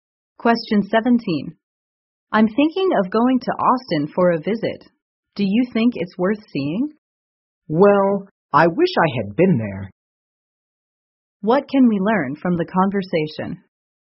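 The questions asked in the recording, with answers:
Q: What can we learn from the conversation?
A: The woman has never been to Austin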